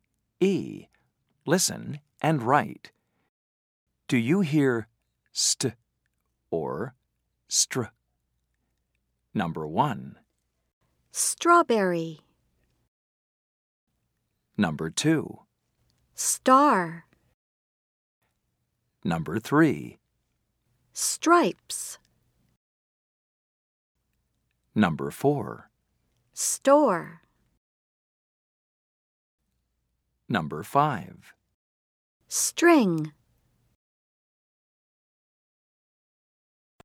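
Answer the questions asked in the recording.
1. str (Strawberry)
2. st (Star)
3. str (Stripes)
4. st (Store)
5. str (String)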